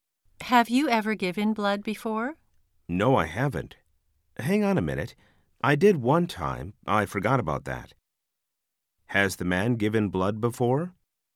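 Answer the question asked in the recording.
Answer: Yes, once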